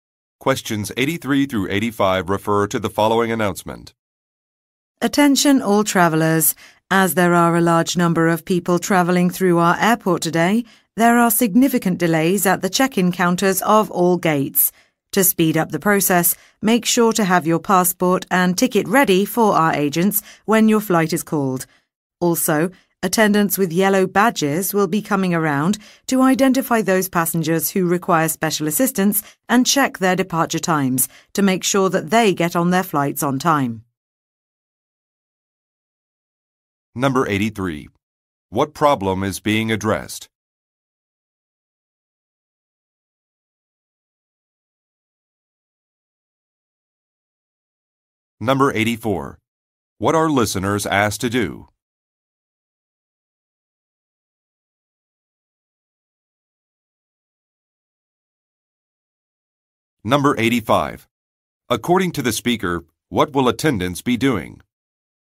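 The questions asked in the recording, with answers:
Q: What problem is being addressed?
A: Significant delays at the check-in counters

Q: What are listeners asked to do?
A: Have their passport and ticket ready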